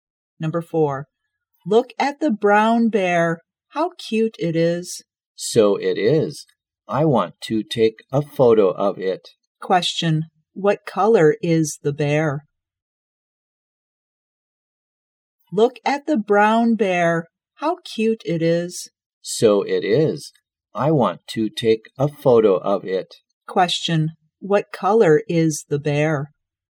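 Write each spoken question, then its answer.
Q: what color is the bear?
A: Brown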